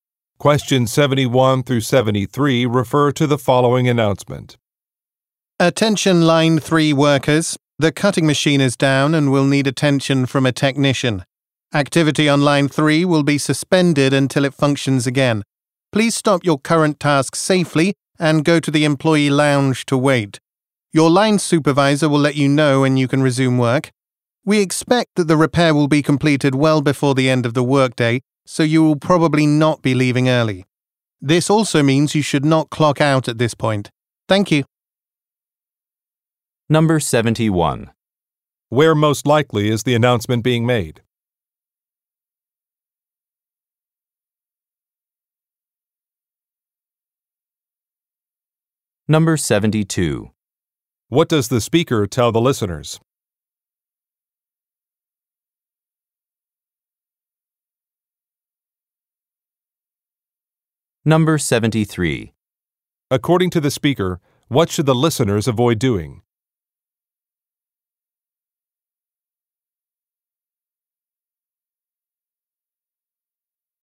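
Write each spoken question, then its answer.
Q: Where most likely is the announcement being made?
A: At a factory

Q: According to the speaker, what should the listeners avoid doing?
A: Clocking out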